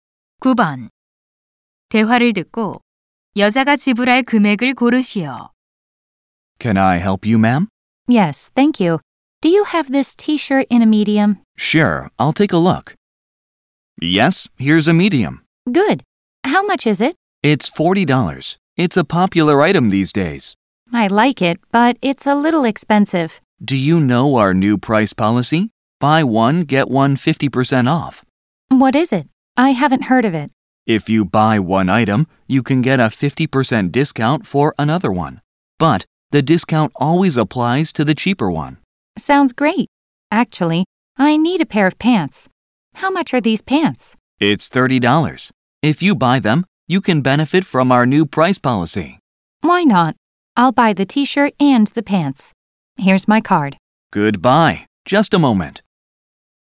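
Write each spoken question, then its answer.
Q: 대화를 듣고 여자가 지불할 금액을 고르시오.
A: 55달러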